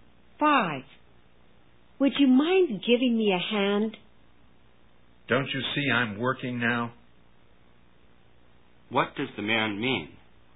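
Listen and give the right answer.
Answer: He can't help because he's busy working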